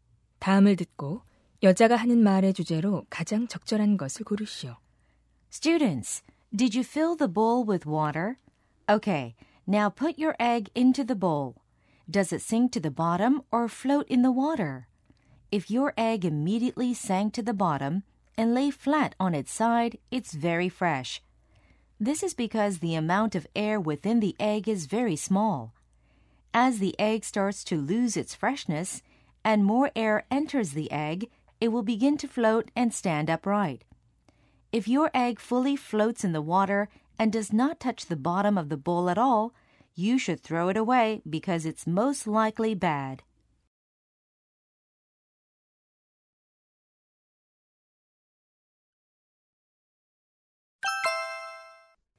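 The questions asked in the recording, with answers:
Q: 다음을 듣고 여자가 하는 말의 주제로 가장 적절한 것을 고르시오.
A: 물에 띄워 달걀의 신선도를 확인하는 방법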